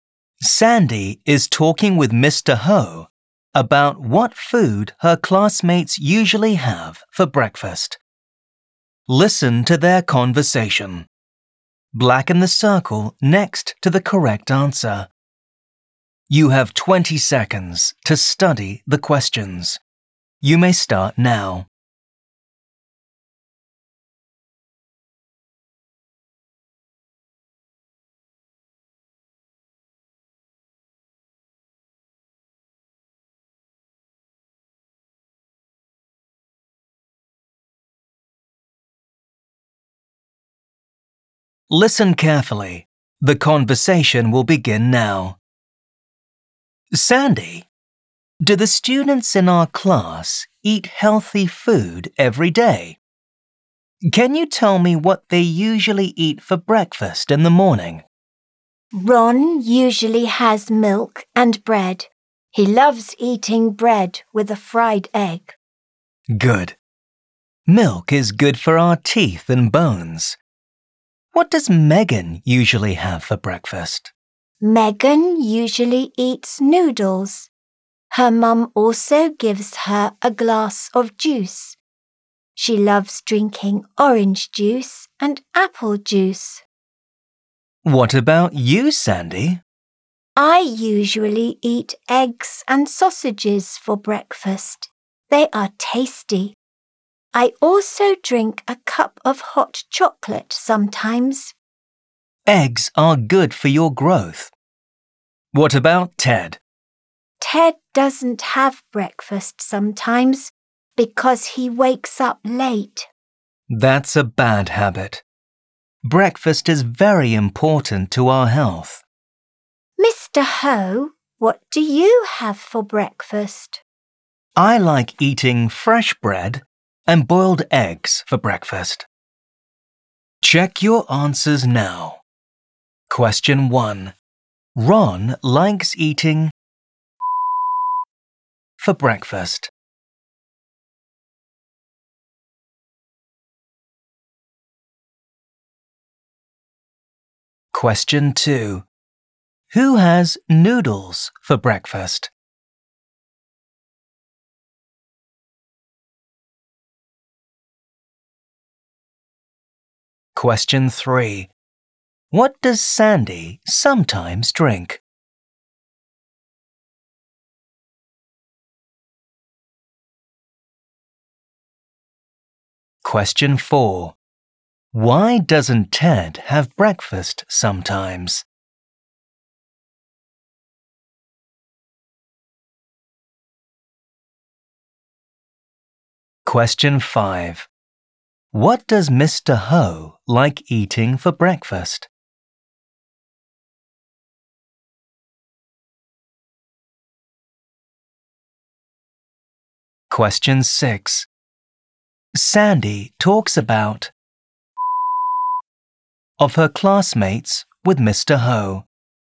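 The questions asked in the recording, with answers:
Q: Ron likes eating for breakfast.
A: bread with a fried egg

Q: Who has noodles for breakfast?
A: Megan

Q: What does Sandy sometimes drink?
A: a cup of hot chocolate

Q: Why doesn't Ted have breakfast sometimes?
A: because he wakes up late

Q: What does Mr. Ho like eating for breakfast?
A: fresh bread and boiled eggs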